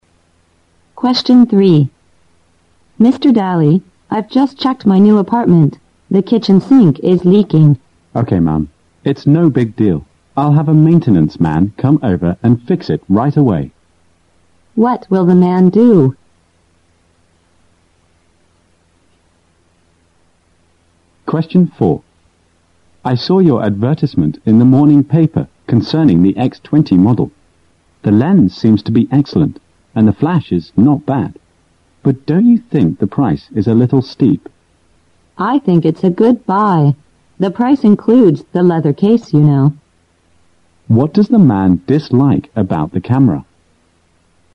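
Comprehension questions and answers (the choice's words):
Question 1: What will the man do?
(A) Clean the kitchen.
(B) Ask someone to fix the sink.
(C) Find a bigger apartment for the lady.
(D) Check the work done by the maintenance man.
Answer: Ask someone to fix the sink.

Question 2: What did the man dislike about the camera?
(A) The lens.?????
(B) The price.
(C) The flash. ????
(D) The leather case.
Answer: The price.

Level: 六级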